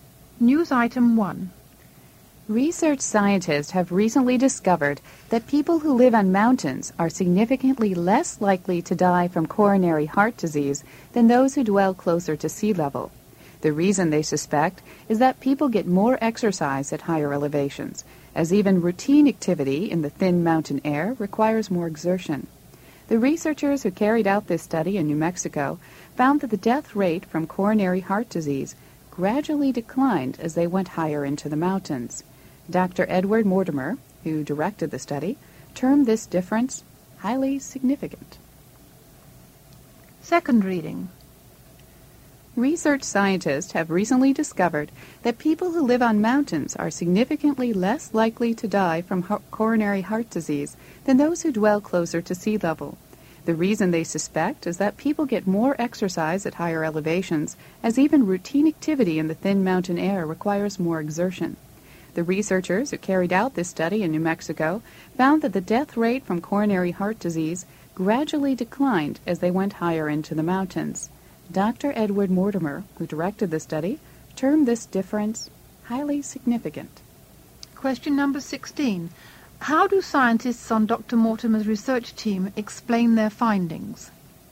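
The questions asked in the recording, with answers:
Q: How do scientists on Dr. Mortimer's research team explain their findings?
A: People get more exercise at higher elevations because activity in thin mountain air takes more effort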